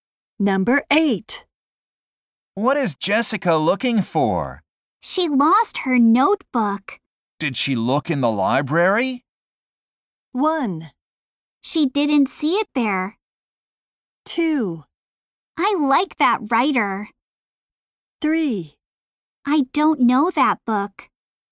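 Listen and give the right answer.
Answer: 1: She didn't see it there.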